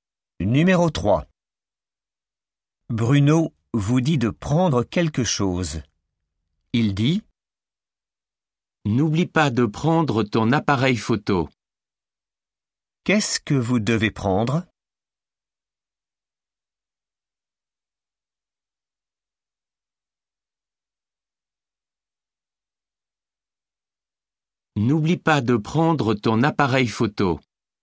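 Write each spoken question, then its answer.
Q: Qu'est-ce que vous devez prendre?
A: ton appareil photo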